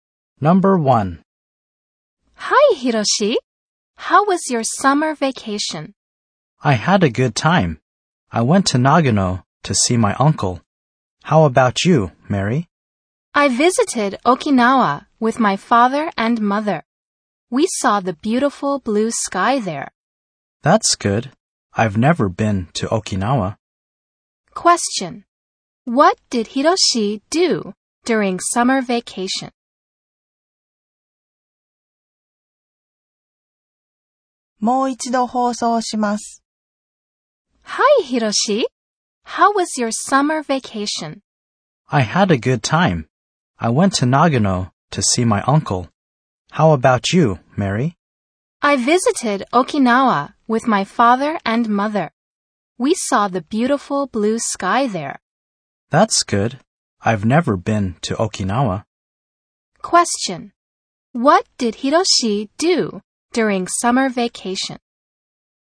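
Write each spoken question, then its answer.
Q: What did Hiroshi do during summer vacation?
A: He went to Nagano to see his uncle.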